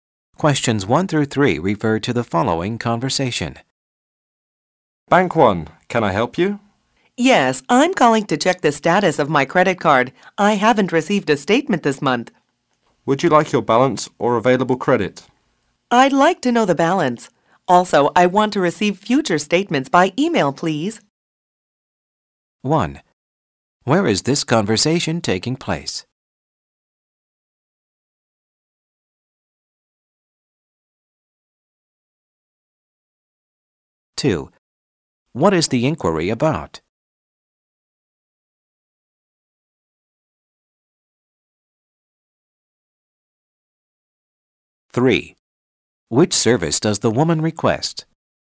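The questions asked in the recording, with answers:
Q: Where is this conversation taking place?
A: At a bank (on the phone)

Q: What is the inquiry about?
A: Her credit card balance/statement

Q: Which service does the woman request?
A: Receiving statements by email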